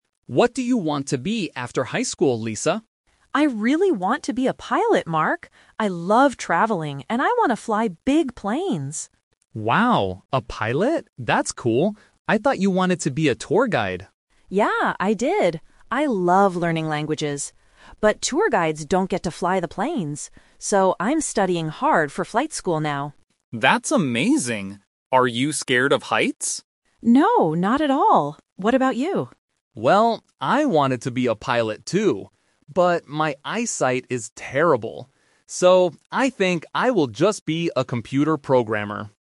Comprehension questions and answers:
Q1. What is Lisa's dream job now?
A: Pilot

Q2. Why does Lisa want to do this job?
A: Because she wants to travel and fly big planes.

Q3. Why did Mark change his mind about being a pilot?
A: His eyesight is very bad.

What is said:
Mark: What do you want to be after high school, Lisa?
Lisa: I really want to be a pilot, Mark. I love traveling and I want to fly big planes!
Mark: Wow, a pilot? That's cool. I thought you wanted to be a tour guide.
Lisa: Yeah, I did. I love learning languages. But tour guides don't get to fly the planes. So, I'm studying hard for flight school now.
Mark: That's amazing. Are you scared of heights?
Lisa: No, not at all! What about you?
But my eyesight is terrible. So, I think I will just be a computer programmer.